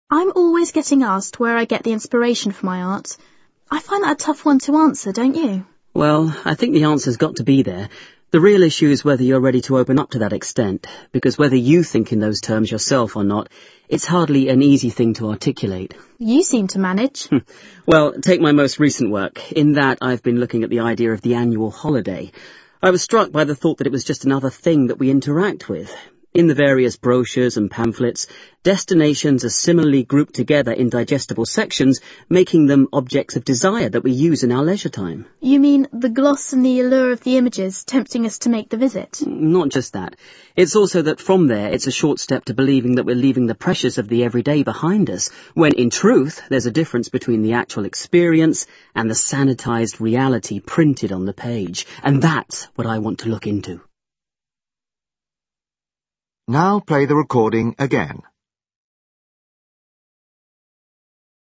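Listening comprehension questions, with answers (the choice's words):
Escucha el audio y contesta las preguntas.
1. You hear part of a discussion programme in which two artists are talking about their work. What do they agree about inspiration?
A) An artist must know where it comes from.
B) Non-artists are unlikely to understand it.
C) Not all artists are willing to talk about it.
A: Not all artists are willing to talk about it.

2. In his latest work, the man is exploring whether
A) holiday brochures are actually works of art.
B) the visual material in holiday brochures is effective.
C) we are misled by the image projected in holiday brochures.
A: we are misled by the image projected in holiday brochures.

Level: A2 a C1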